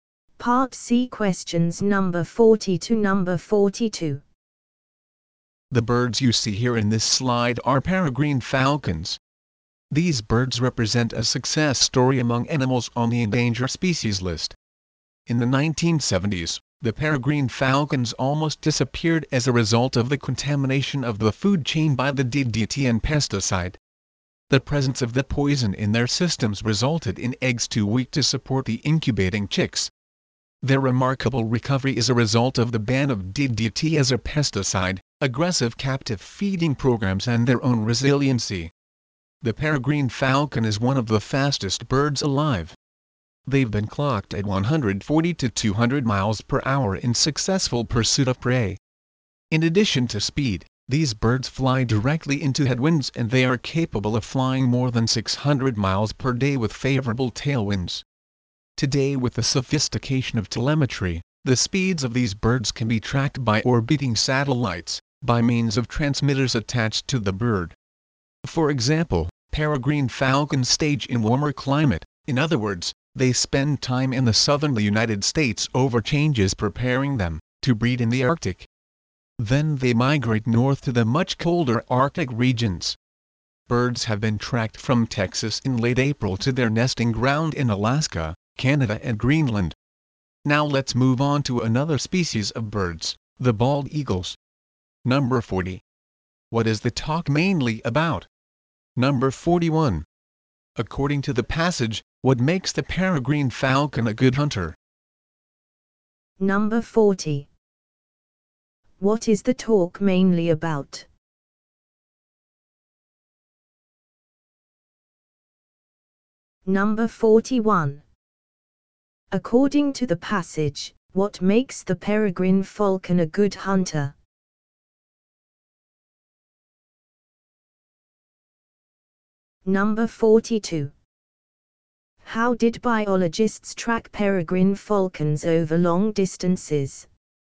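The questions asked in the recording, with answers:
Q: What is the talk mainly about?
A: Peregrine falcons: their recovery and abilities

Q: According to the passage, what makes the peregrine falcon a good hunter?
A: Its great speed

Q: How did biologists track peregrine falcons over long distances?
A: With transmitters attached to the birds, tracked by satellites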